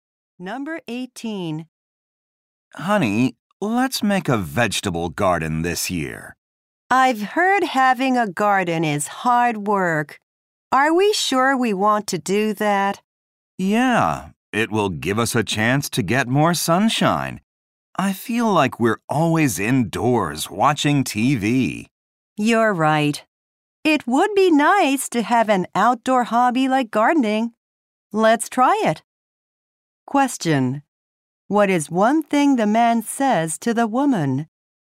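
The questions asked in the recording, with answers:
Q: What is one thing the man says to the woman?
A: Gardening will give them more sunshine.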